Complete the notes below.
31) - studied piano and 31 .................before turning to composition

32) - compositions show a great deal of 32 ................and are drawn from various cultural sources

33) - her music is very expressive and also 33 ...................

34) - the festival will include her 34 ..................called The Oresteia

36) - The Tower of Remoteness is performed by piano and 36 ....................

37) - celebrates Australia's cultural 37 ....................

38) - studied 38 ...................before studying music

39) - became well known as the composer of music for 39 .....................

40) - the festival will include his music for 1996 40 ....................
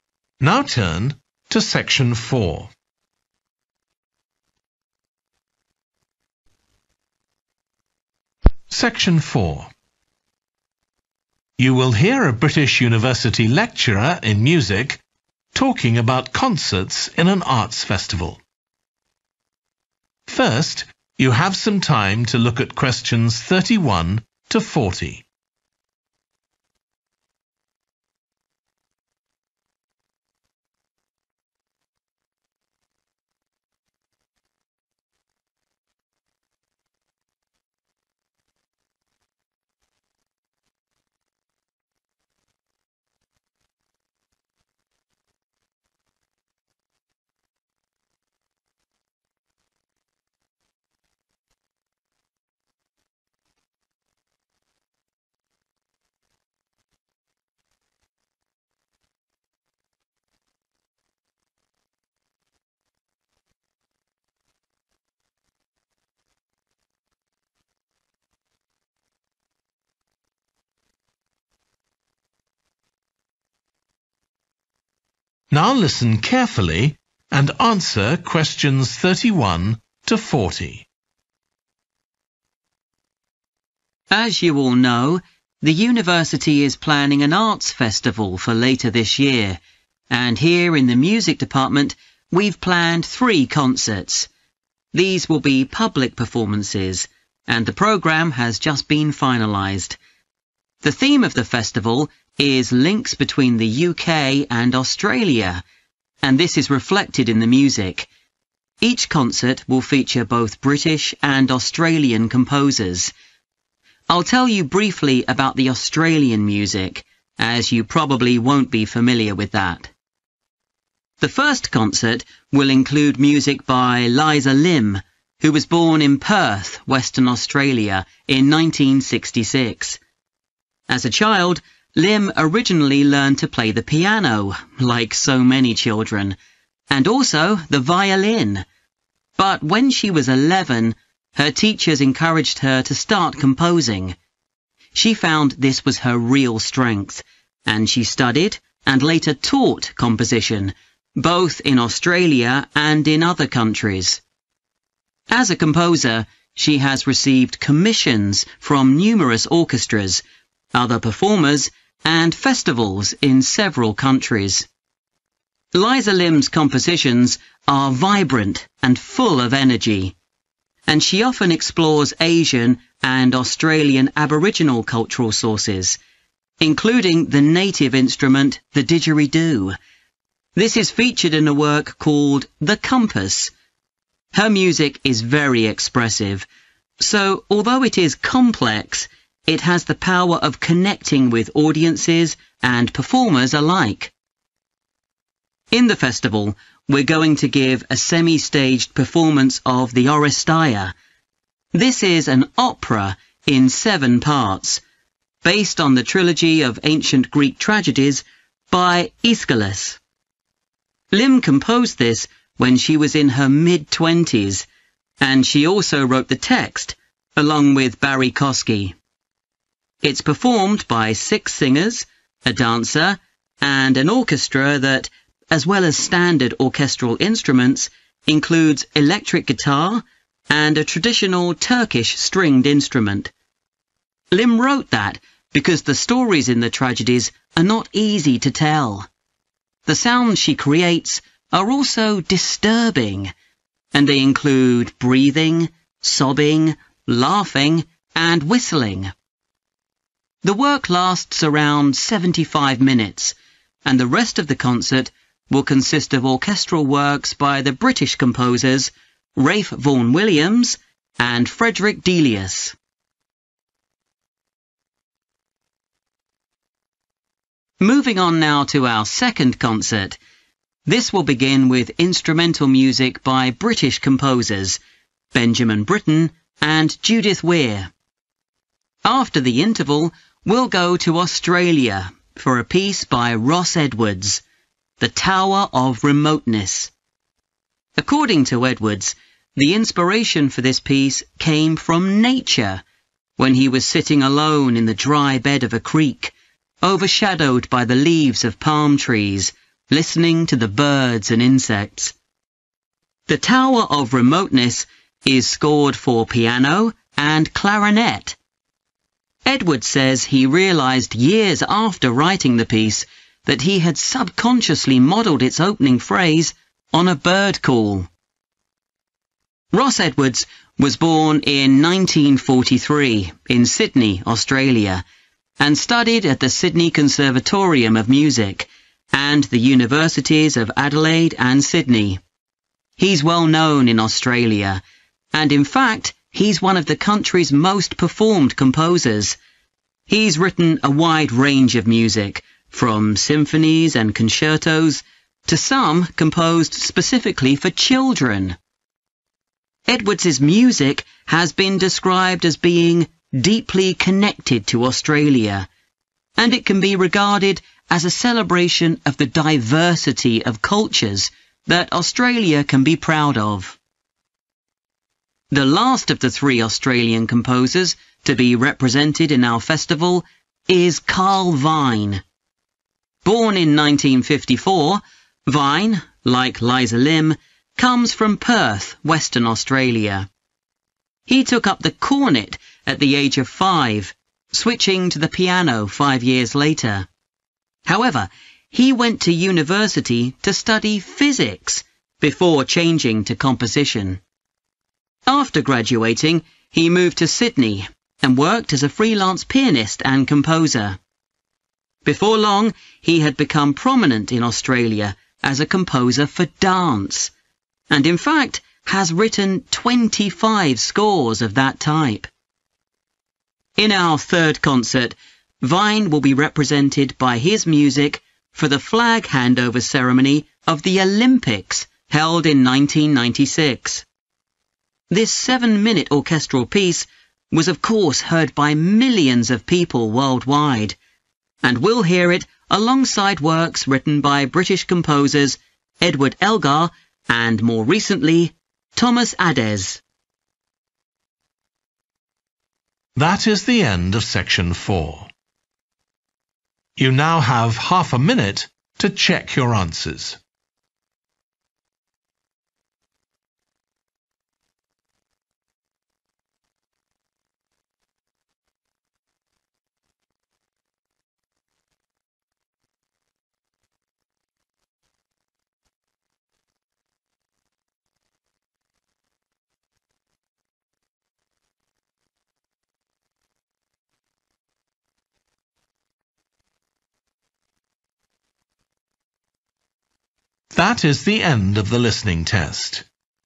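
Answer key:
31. violin
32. energy
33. complex
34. opera
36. clarinet
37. diversity
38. physics
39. dance
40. Olympics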